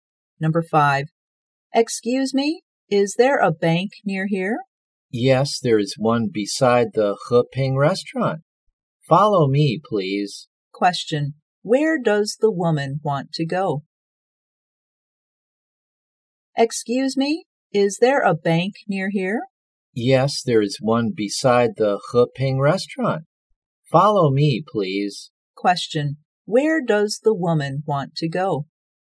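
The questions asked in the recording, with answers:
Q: Where does the woman want to go?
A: A bank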